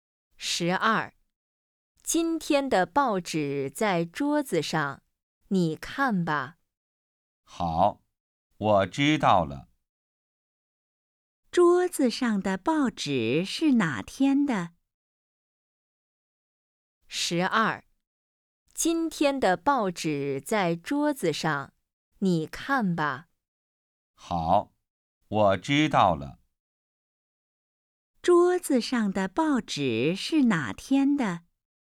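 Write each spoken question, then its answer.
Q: 桌子上的报纸是哪天的?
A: 今天的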